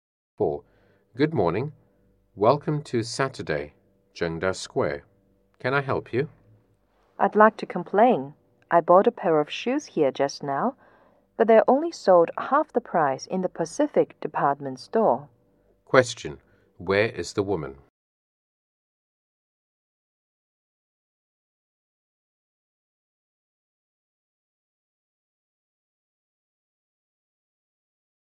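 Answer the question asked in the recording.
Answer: At Zhengda Square (a shopping mall)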